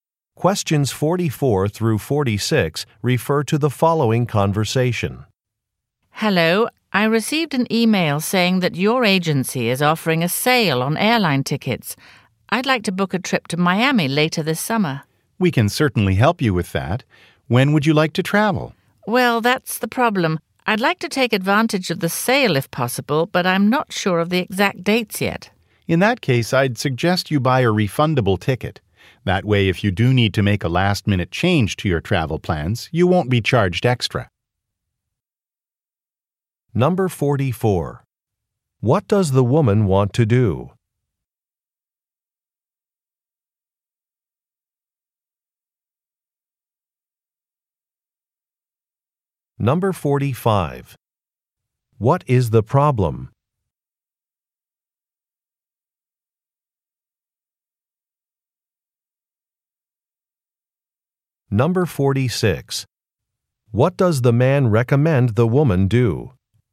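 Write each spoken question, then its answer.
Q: What does the woman want to do?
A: Book a trip to Miami

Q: What is the problem?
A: She isn't sure of her travel dates

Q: What does the man recommend the woman do?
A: Buy a refundable ticket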